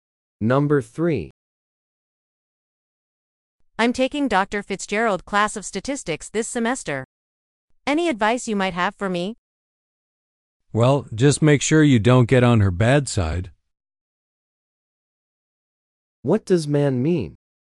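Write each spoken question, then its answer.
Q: What does man mean?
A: The woman should avoid upsetting Dr. Fitzgerald.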